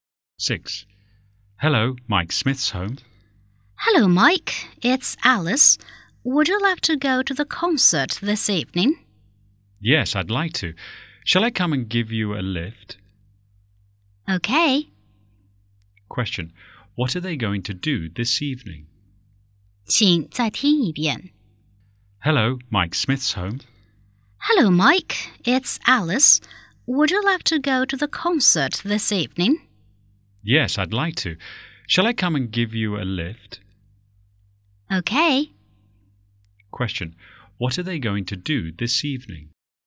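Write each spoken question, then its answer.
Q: Question. What are they going to do this evening?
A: Go to a concert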